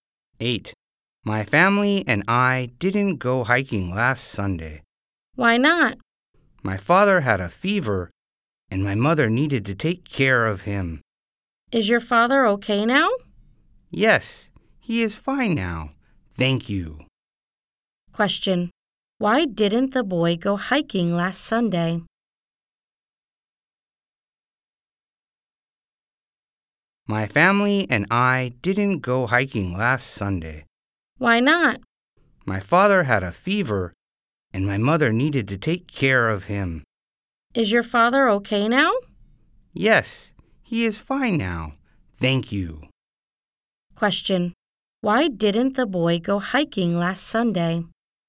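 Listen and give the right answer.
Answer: His father had a fever and his mother took care of him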